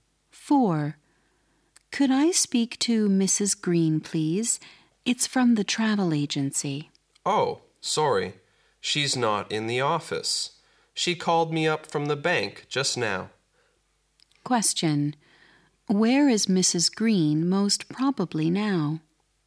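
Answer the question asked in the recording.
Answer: At the bank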